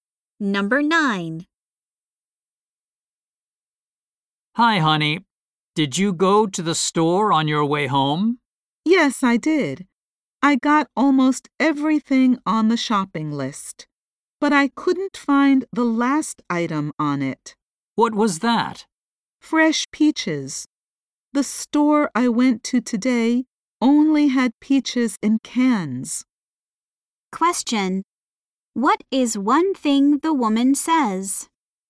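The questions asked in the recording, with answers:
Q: What is one thing the woman says?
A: She couldn't find fresh peaches.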